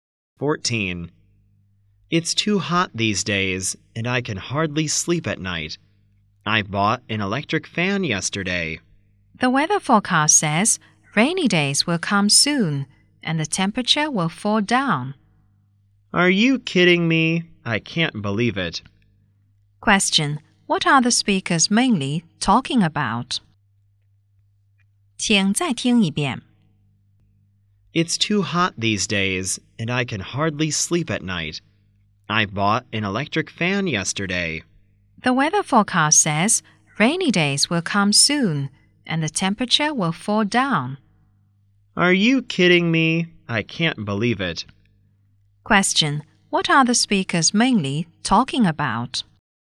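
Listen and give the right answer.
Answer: The weather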